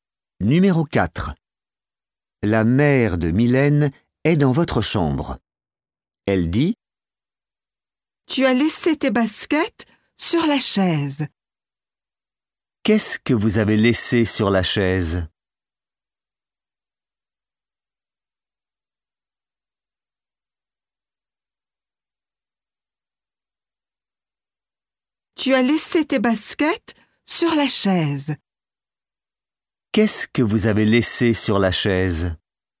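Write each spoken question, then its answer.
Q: Qu'est-ce que vous avez laissé sur la chaise?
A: Vos baskets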